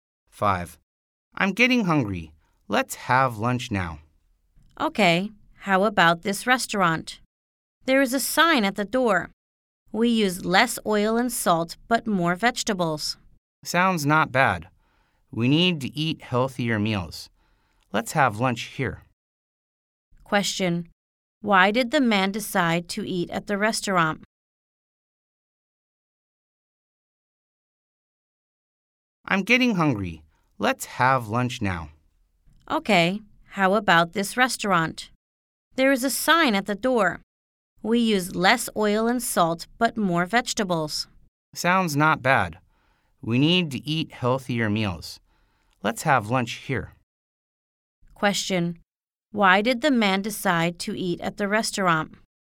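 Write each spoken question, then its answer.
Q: Why did the man decide to eat at the restaurant?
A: It uses less oil and salt and more vegetables, so the meals are healthier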